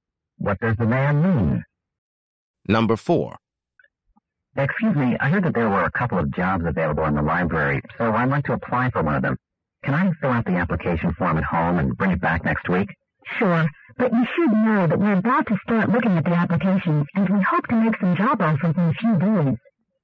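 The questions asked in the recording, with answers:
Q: What does the woman imply?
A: He should turn in the application soon, or he may miss the chance.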